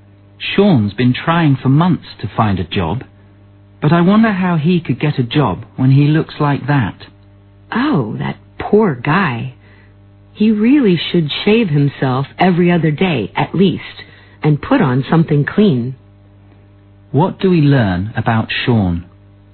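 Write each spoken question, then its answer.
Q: What do we learn about Sean?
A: He looks messy and untidy, which may be why he can't get a job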